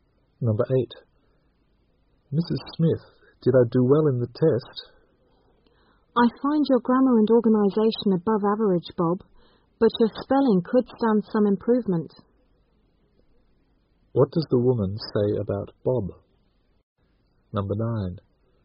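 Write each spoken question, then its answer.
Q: What does the woman say about Bob?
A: His spelling needs improvement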